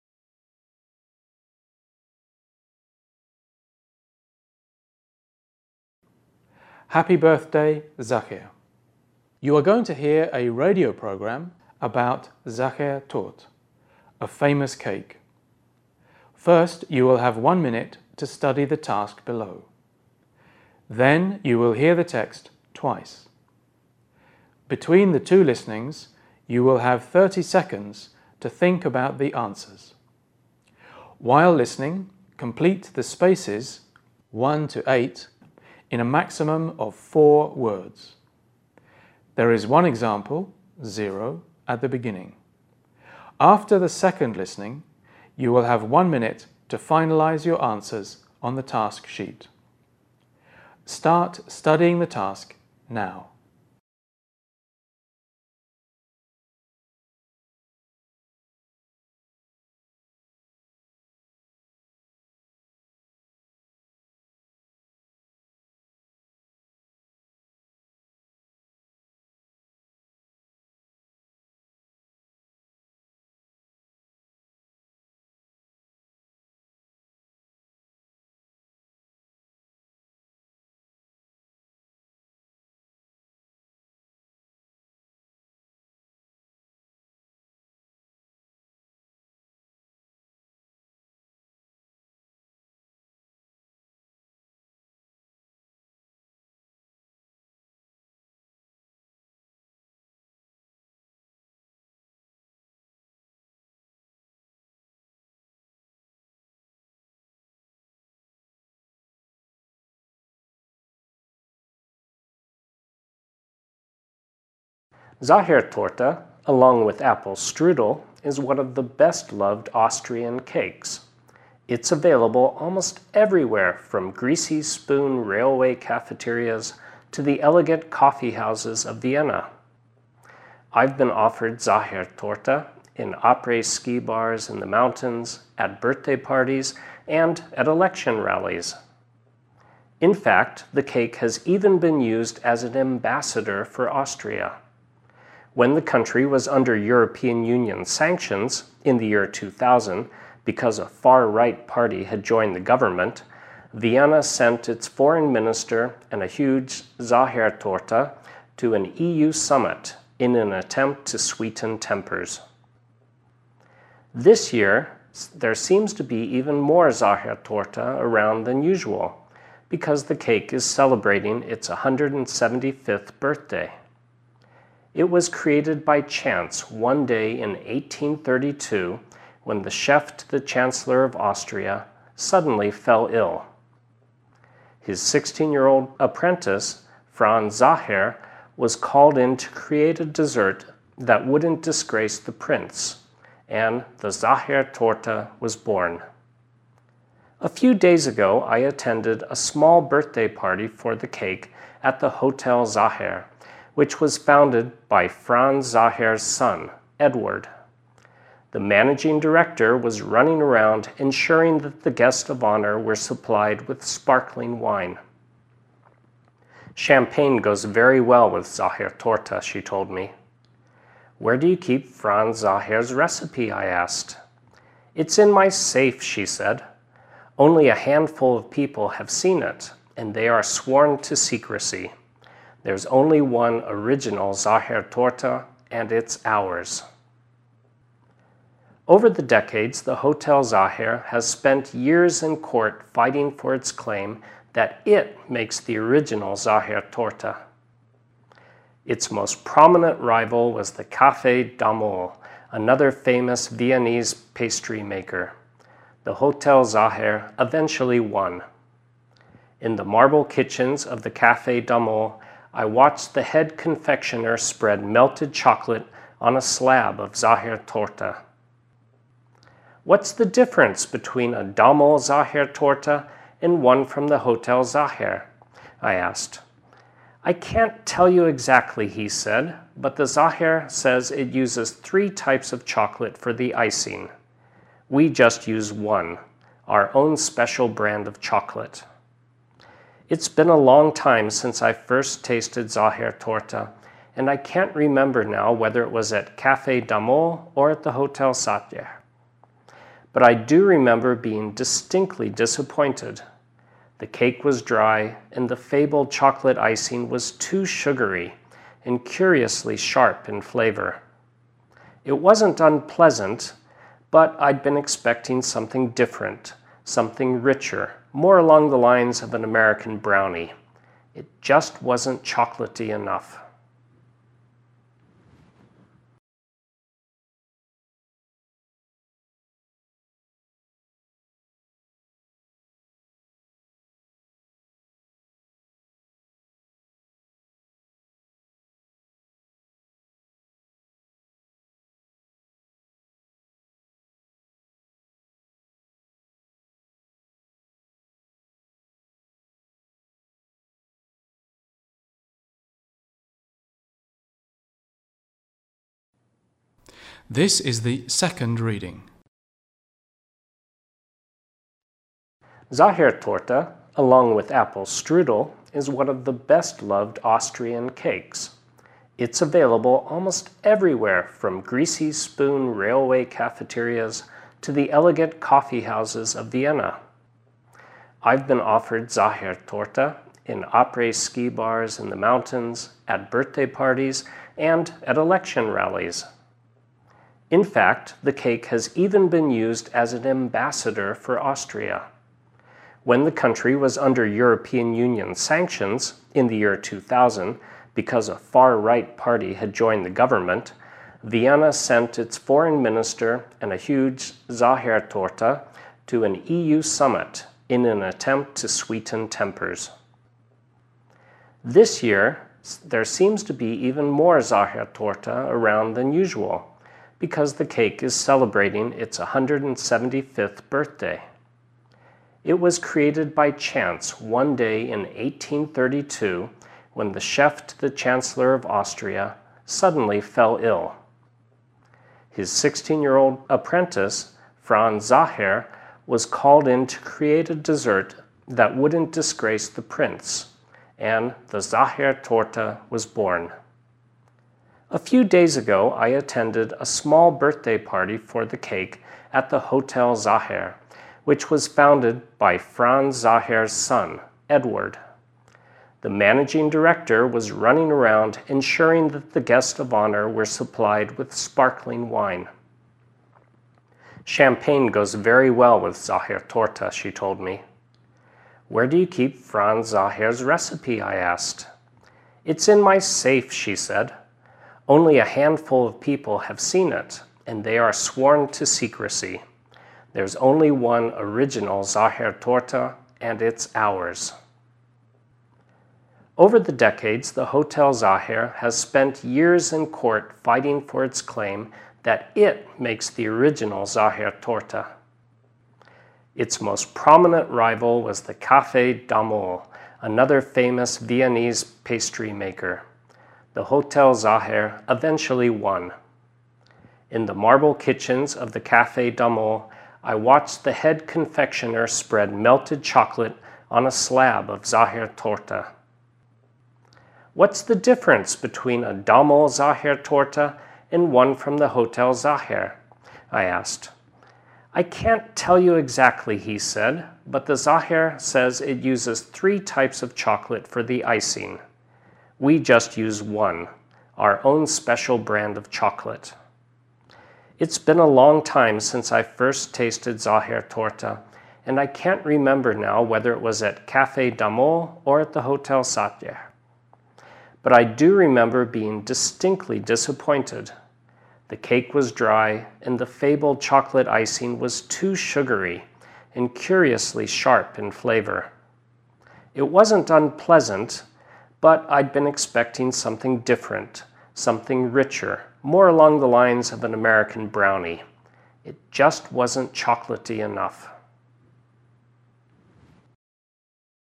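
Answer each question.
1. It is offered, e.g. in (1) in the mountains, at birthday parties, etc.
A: après-ski bars

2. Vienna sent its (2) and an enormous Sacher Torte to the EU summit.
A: foreign minister

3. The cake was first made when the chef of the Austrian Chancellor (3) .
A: suddenly fell ill

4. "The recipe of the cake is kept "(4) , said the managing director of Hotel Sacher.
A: in my safe

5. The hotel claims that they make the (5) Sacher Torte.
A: original

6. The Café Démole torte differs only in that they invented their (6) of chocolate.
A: own special brand

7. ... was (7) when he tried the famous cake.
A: distinctly disappointed

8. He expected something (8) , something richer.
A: different

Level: B2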